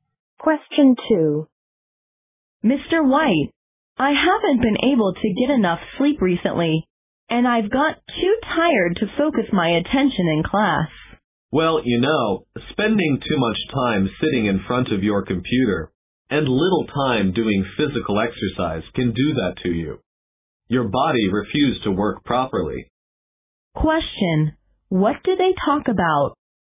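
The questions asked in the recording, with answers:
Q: What do they talk about?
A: The student's tiredness and lack of sleep, caused by too much computer time and too little exercise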